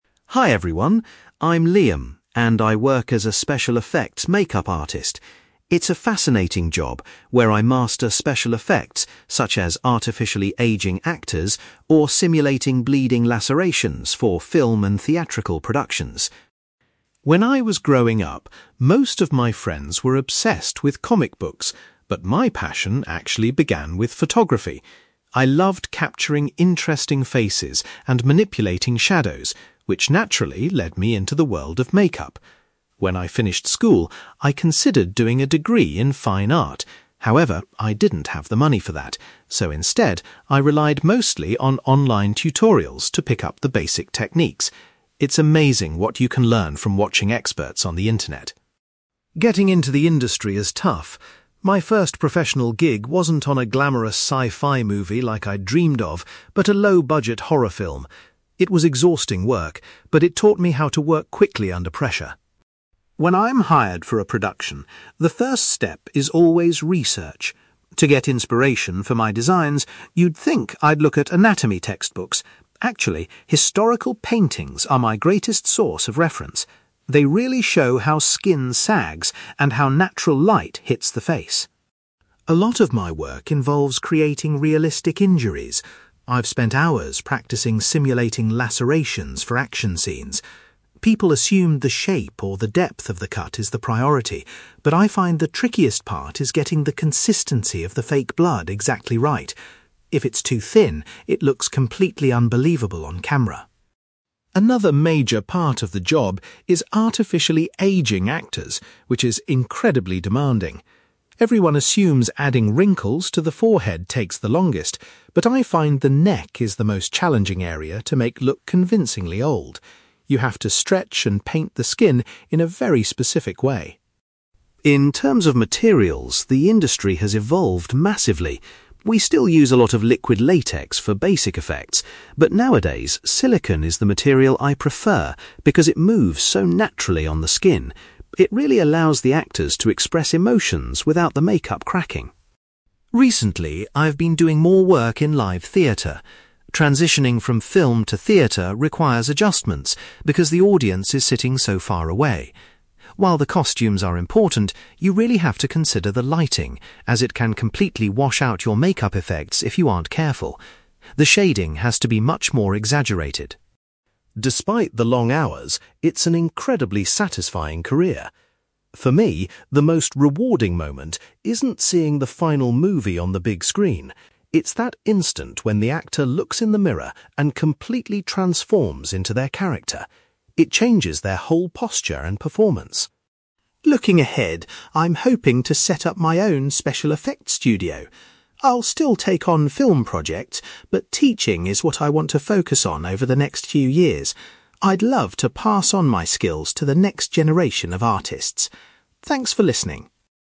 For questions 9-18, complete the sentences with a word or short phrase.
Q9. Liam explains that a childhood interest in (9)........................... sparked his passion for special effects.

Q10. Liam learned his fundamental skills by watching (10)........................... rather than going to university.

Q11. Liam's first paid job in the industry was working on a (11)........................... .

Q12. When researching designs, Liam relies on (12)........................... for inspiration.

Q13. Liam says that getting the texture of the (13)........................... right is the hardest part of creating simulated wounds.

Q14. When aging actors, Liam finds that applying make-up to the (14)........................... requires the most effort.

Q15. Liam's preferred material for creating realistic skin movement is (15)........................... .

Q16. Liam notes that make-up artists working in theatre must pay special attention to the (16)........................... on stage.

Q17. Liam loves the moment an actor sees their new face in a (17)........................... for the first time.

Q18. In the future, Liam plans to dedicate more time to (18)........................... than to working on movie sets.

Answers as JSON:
{"9": "photography", "10": "online tutorials", "11": "horror film", "12": "historical paintings", "13": "fake blood", "14": "neck", "15": "silicone", "16": "lighting", "17": "mirror", "18": "teaching"}

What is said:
Liam: Hi everyone. I'm Liam, and I work as a special effects make-up artist. It's a fascinating job where I master special effects, such as artificially aging actors or simulating bleeding lacerations for film and theatrical productions.
When I was growing up, most of my friends were obsessed with comic books, but my passion actually began with photography. I loved capturing interesting faces and manipulating shadows, which naturally led me into the world of make-up. When I finished school, I considered doing a degree in fine art. However, I didn't have the money for that, so instead, I relied mostly on online tutorials to pick up the basic techniques. It's amazing what you can learn from watching experts on the internet.
Getting into the industry is tough. My first professional gig wasn't on a glamorous sci-fi movie like I'd dreamed of, but a low-budget horror film. It was exhausting work, but it taught me how to work quickly under pressure.
When I'm hired for a production, the first step is always research. To get inspiration for my designs, you'd think I'd look at anatomy textbooks. Actually, historical paintings are my greatest source of reference. They really show how skin sags and how natural light hits the face.
A lot of my work involves creating realistic injuries. I've spent hours practicing simulating bleeding lacerations for action scenes. People assume the shape or the depth of the cut is the priority, but I find the trickiest part is getting the consistency of the fake blood exactly right. If it's too thin, it looks completely unbelievable on camera.
Another major part of the job is artificially aging actors, which is incredibly demanding. Everyone assumes adding wrinkles to the forehead takes the longest, but I find the neck is the most challenging area to make look convincingly old. You have to stretch and paint the skin in a very specific way.
In terms of materials, the industry has evolved massively. We still use a lot of liquid latex for basic effects, but nowadays, silicone is the material I prefer because it moves so naturally on the skin. It really allows the actors to express emotions without the make-up cracking.
Recently, I've been doing more work in live theatre. Transitioning from film to theatre requires adjustments because the audience is sitting so far away. While the costumes are important, you really have to consider the lighting, as it can completely wash out your make-up effects if you aren't careful. The shading has to be much more exaggerated.
Despite the long hours, it's an incredibly satisfying career. For me, the most rewarding moment isn't seeing the final movie on the big screen. It's that instant when the actor looks in the mirror and completely transforms into their character. It changes their whole posture and performance.
Looking ahead, I'm hoping to set up my own special effects studio. I'll still take on film projects, but teaching is what I want to focus on over the next few years. I'd love to pass on my skills to the next generation of artists. Thanks for listening.

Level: B2